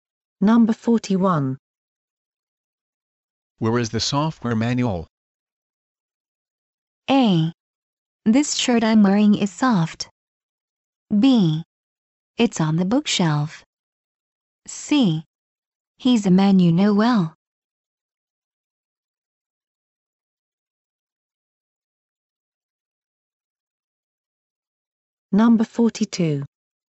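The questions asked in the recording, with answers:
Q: Where is the software manual?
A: B: It's on the bookshelf.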